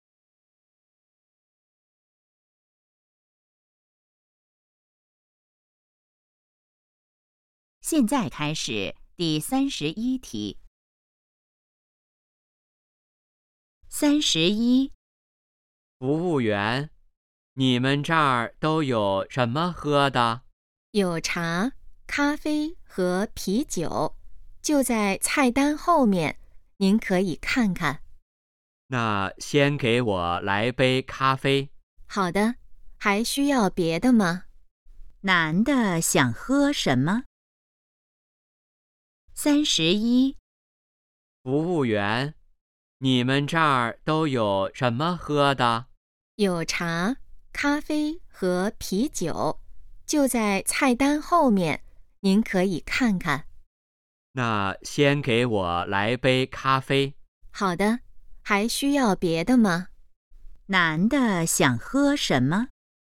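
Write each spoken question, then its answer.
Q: 男的想喝什么?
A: 咖啡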